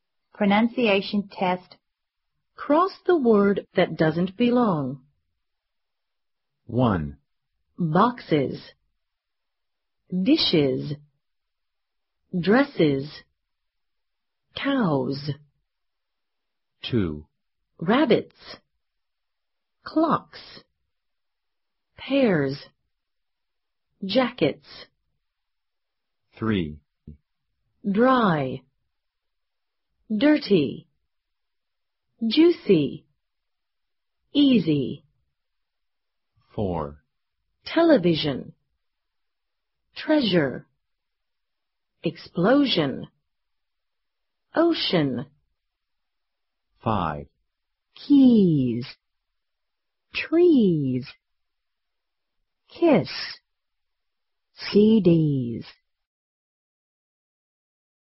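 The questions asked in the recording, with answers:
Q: Boxes. Dishes. Dresses. Cows.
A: Cows

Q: Rabbits. Clocks. Pears. Jackets.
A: Pears

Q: Dry. Dirty. Juicy. Easy.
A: Dry

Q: Television. Treasure. Explosion.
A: Ocean

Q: Keys. Trees. Kiss. CDs.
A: Kiss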